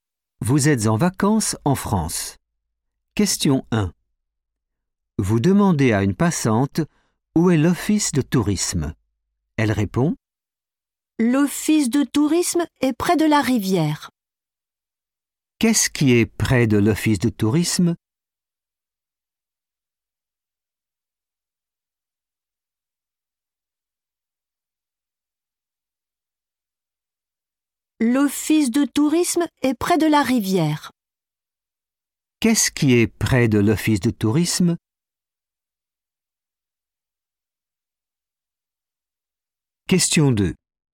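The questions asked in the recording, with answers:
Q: Qu'est-ce qui est près de l'office de tourisme?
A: la rivière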